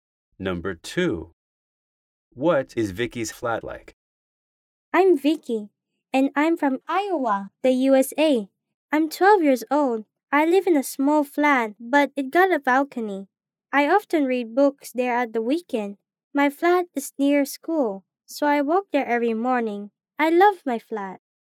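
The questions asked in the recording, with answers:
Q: What is Vicky's flat like?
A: Small, with a balcony, near school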